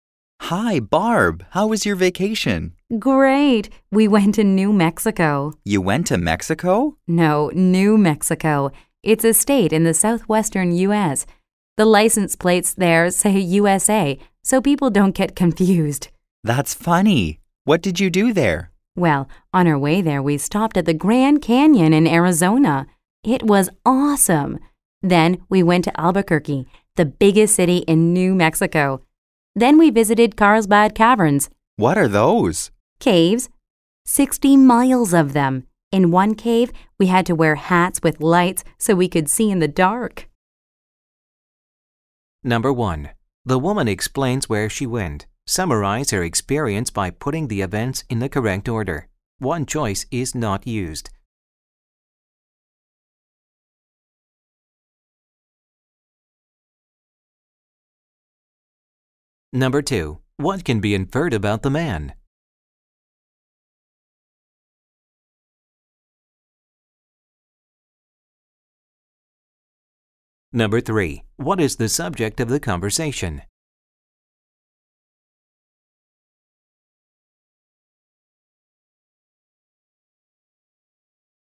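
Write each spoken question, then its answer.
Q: What is the subject of the conversation?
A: The woman's vacation in New Mexico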